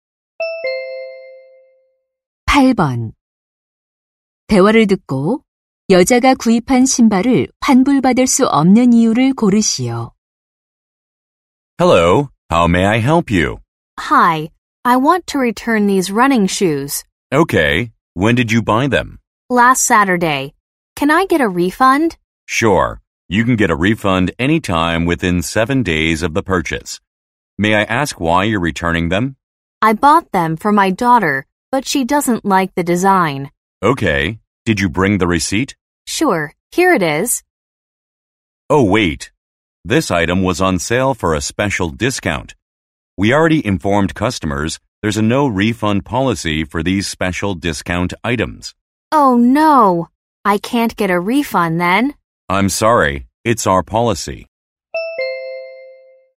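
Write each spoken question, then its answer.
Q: 대화를 듣고 여자가 구입한 신발을 환불받을 수 없는 이유를 고르시오.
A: 특별 할인 상품이라 환불 불가 정책 때문에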